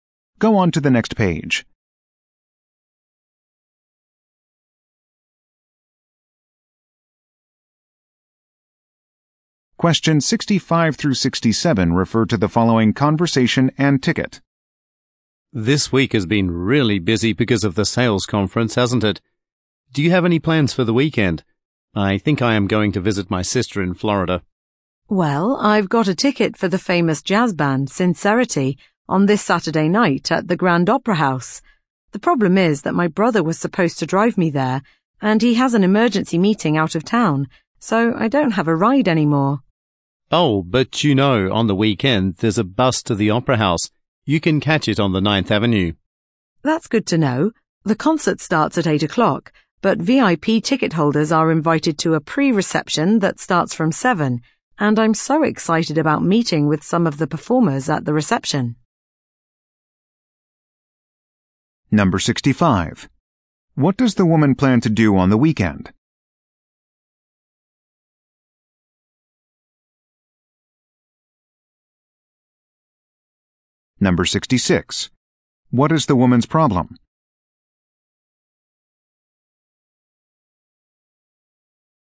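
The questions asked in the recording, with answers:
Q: What is the woman's problem?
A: She doesn't have a ride to the concert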